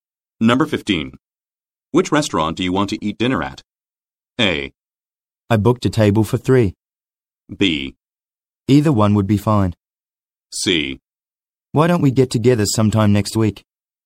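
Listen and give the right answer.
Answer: B: Either one would be fine.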